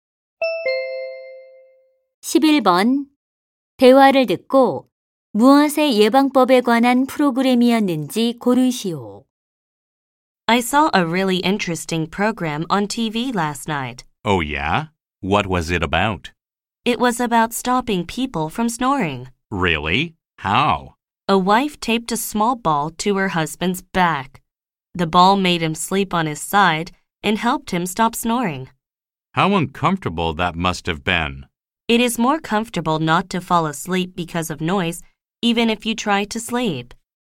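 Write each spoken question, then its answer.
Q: 대화를 듣고 무엇의 예방법에 관한 프로그램이었는지 고르시오.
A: 코골이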